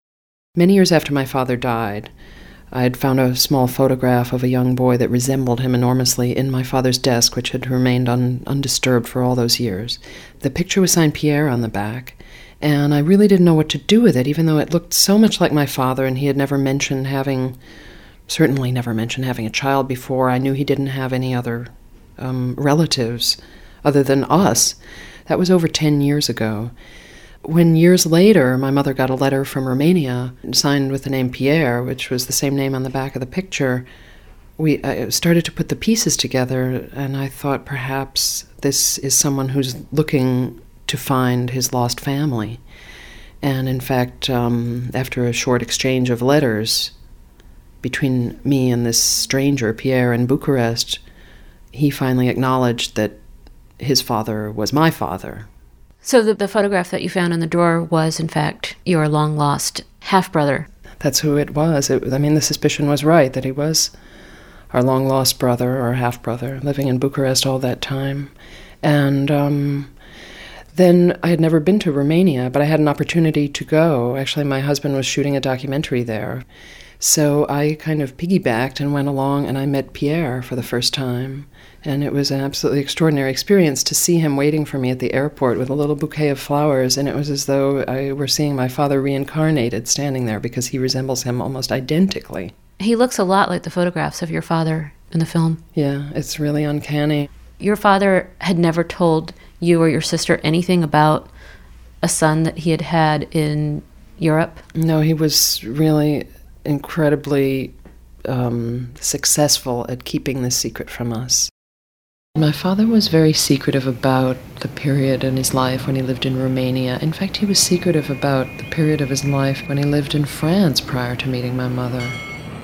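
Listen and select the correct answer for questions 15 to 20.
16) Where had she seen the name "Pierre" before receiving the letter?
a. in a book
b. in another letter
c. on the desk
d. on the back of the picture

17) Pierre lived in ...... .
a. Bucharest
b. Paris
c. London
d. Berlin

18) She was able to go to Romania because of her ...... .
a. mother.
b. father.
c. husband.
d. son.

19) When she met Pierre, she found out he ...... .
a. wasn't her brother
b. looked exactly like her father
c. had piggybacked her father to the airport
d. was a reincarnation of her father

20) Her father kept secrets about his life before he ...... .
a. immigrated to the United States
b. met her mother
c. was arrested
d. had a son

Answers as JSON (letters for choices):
{"16": "d", "17": "a", "18": "c", "19": "b", "20": "b"}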